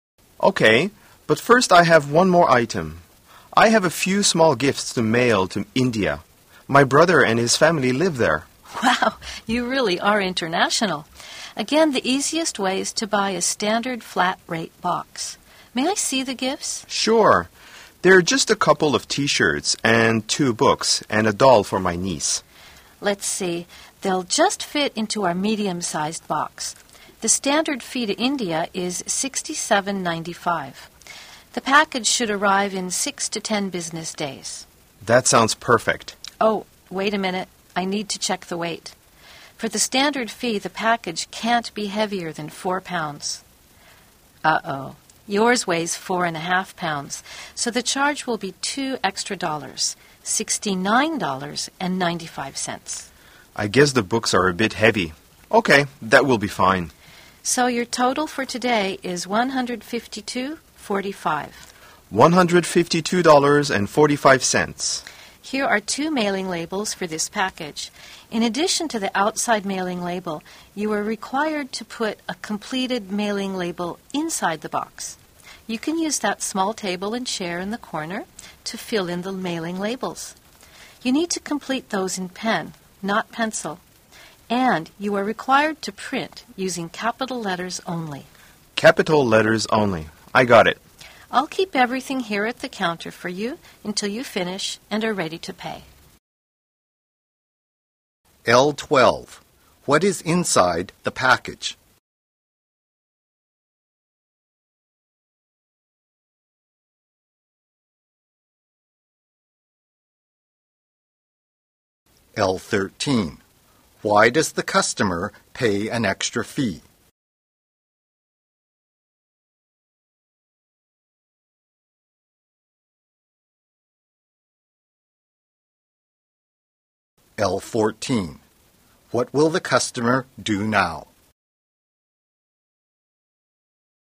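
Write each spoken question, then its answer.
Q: What is inside the package?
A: A couple of T-shirts, 2 books and a doll

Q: Why does the customer pay an extra fee?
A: The package weighs more than 4 pounds

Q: What will the customer do now?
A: Fill in the mailing labels at the table in the corner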